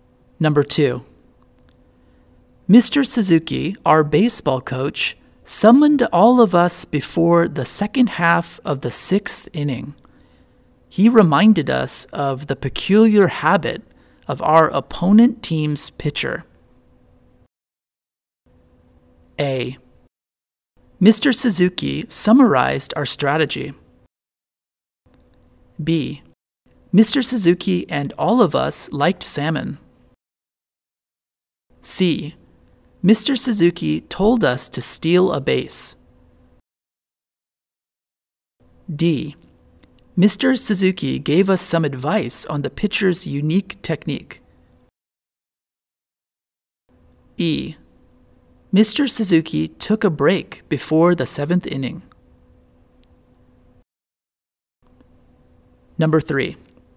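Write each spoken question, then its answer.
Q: Mr. Suzuki, our baseball coach, summoned all of us before the second half of the sixth inning.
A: D: Mr. Suzuki gave us some advice on the pitcher's unique technique.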